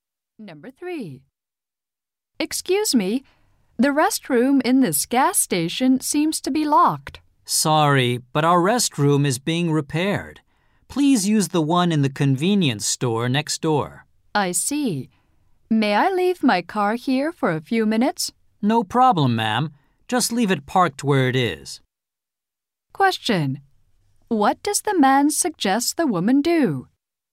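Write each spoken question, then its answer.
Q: What does the man suggest the woman do?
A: Use the restroom in the convenience store next door.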